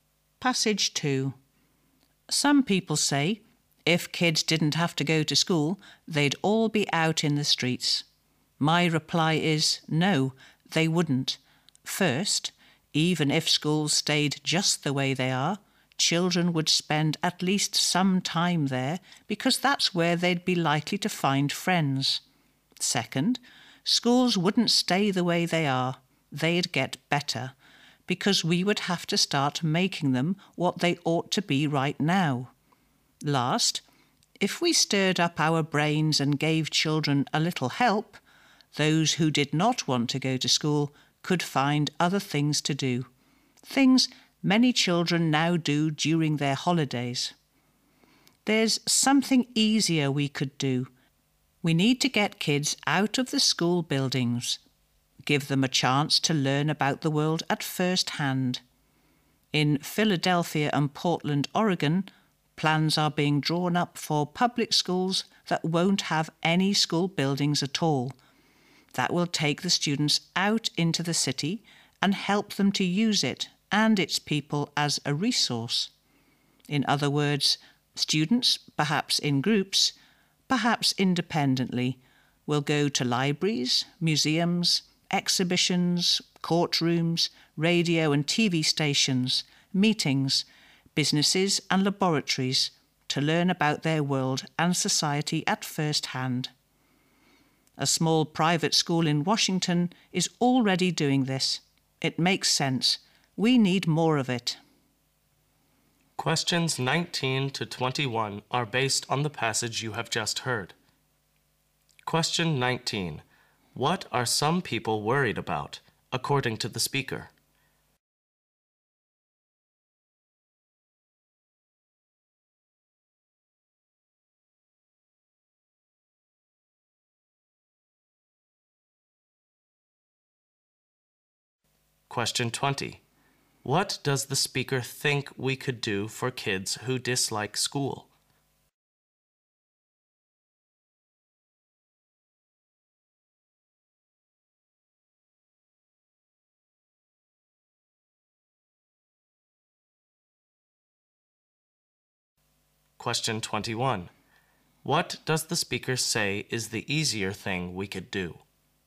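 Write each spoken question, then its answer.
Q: What are some people worried about, according to the speaker?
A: That kids would be out in the streets if they didn't have to go to school

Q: What does the speaker think we could do for kids who dislike school?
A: Help them find other things to do

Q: What does the speaker say is the easier thing we could do?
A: Get kids out of school buildings to learn about the world at first hand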